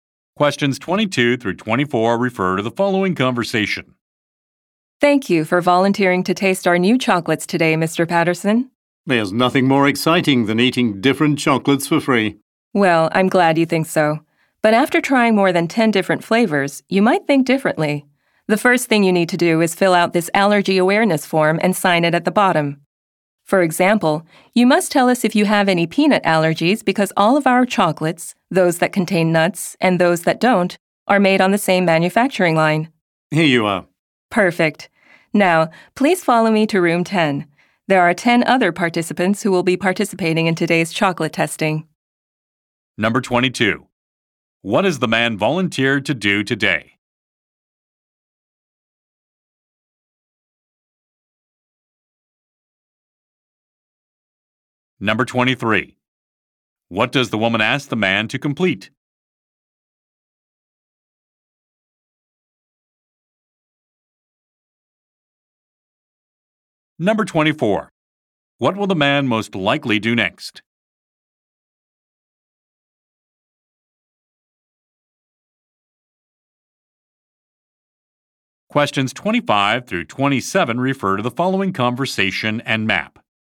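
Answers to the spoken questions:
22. Taste new chocolates
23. An allergy awareness form
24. Go to room 10 for the chocolate testing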